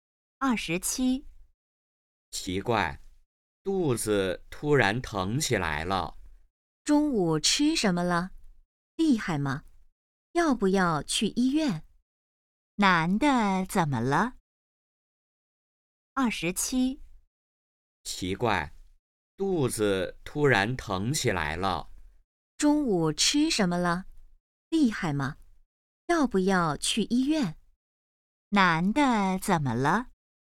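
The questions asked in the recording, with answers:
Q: 男的怎么了?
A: 肚子疼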